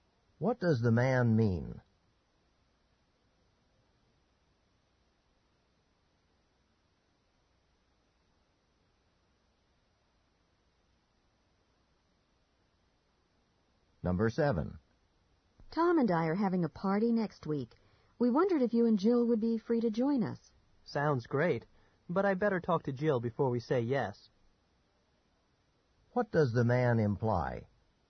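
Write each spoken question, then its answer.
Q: What does the man imply?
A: He must check with Jill before accepting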